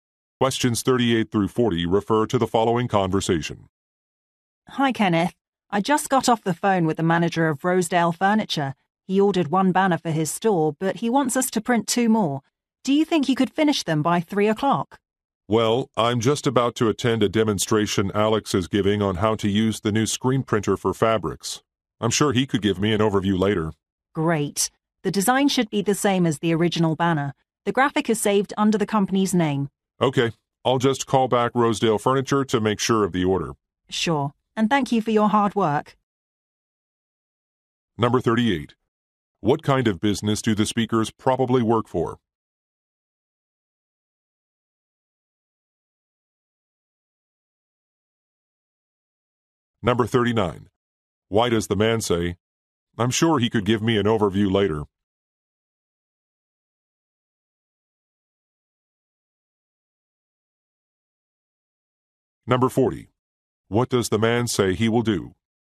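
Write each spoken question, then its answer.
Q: What kind of business do the speakers probably work for?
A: A printing company

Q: Why does the man say, "I'm sure he could give me an overview later"?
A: He can skip the demonstration to print the banners

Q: What does the man say he will do?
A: Call Rosedale Furniture to confirm the order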